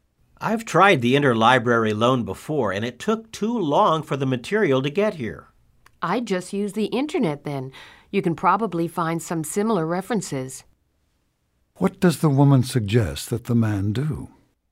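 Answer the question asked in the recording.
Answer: Use the internet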